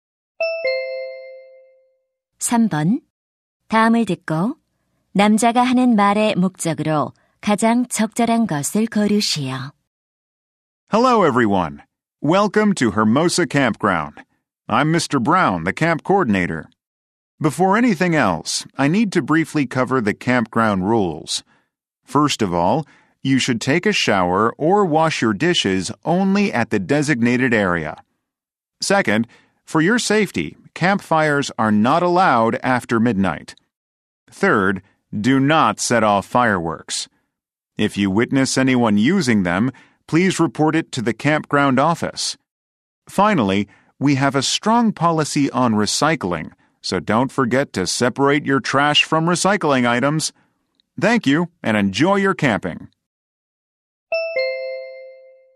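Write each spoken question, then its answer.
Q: 다음을 듣고 남자가 하는 말의 목적으로 가장 적절한 것을 고르시오.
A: 캠핑장 규칙을 안내하려고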